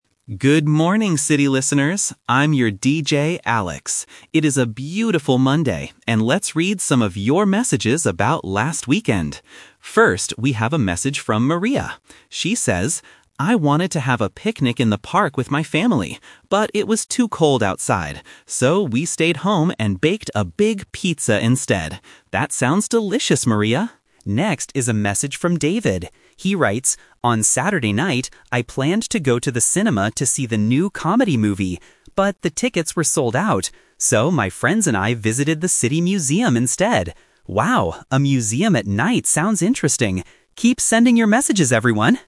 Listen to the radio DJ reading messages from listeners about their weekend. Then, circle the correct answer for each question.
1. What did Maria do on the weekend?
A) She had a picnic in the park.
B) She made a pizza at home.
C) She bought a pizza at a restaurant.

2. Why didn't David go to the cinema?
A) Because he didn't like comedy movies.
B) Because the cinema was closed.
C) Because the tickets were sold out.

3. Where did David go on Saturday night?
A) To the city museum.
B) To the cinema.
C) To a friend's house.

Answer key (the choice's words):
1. She made a pizza at home.
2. Because the tickets were sold out.
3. To the city museum.

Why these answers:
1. The DJ reads Maria's message: "So, we stayed home and baked a big pizza instead." Option (A) is the trap (The Twist); she wanted to have a picnic, but it was too cold. Option (C) is a distracter because she baked it at home, not at a restaurant.
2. David's message clearly states: "But the tickets were sold out." Options (A) and (B) are plausible reasons why someone wouldn't go to the cinema, but they are not mentioned in the audio.
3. The DJ reads David's result: "So, my friends and I visited the city museum instead." Option (B) is the trap; David planned to go to the cinema, but he couldn't get tickets. Option (C) is a distracter.

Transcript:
DJ Alex: Good morning, city listeners! I'm your DJ, Alex. It is a beautiful Monday, and let's read some of your messages about last weekend. First, we have a message from Maria. She says, "I wanted to have a picnic in the park with my family. But it was too cold outside. So, we stayed home and baked a big pizza instead." That sounds delicious, Maria! Next is a message from David. He writes, "On Saturday night, I planned to go to the cinema to see the new comedy movie. But the tickets were sold out. So, my friends and I visited the city museum instead." Wow, a museum at night sounds interesting!

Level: A2